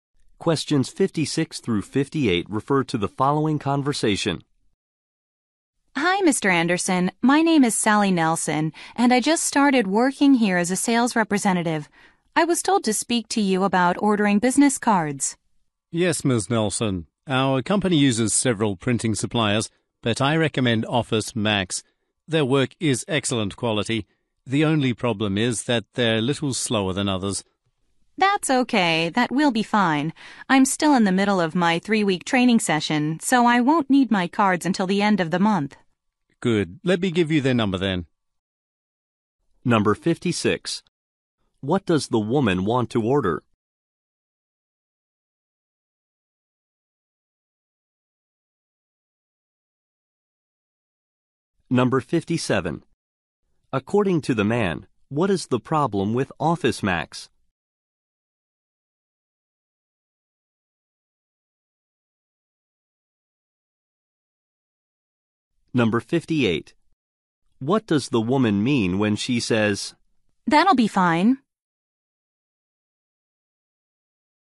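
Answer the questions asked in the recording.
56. Business cards
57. They are slower than others
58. She doesn't mind waiting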